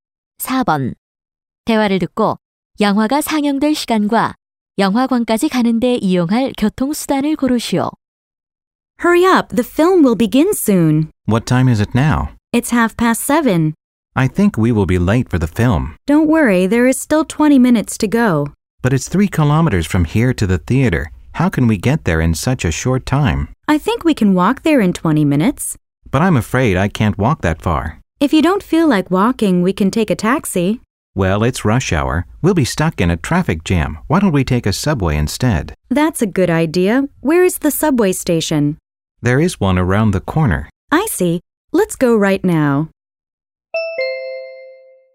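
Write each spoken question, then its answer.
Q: 대화를 듣고 영화가 상영될 시간과 영화관까지 가는 데 이용할 교통수단을 고르시오.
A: 7시 50분, 지하철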